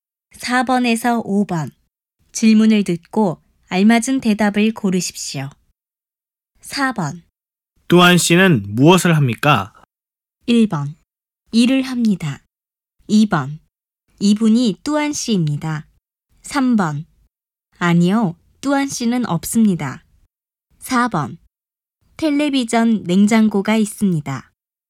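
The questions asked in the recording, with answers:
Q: 뚜안 씨는 무엇을 합니까?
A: 1: 일을 합니다.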